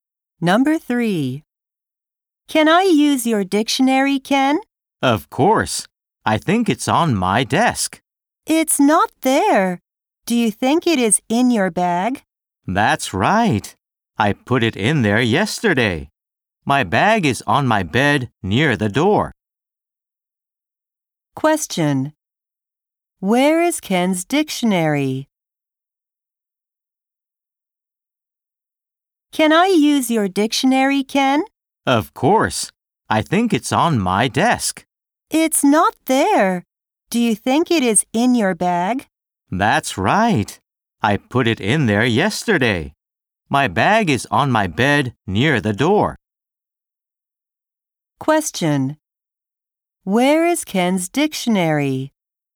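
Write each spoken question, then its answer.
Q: Question. Where is Ken's dictionary?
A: In his bag on his bed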